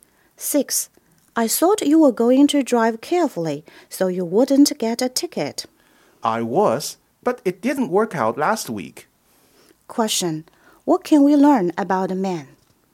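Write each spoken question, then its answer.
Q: What can we learn about the man?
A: He got a ticket last week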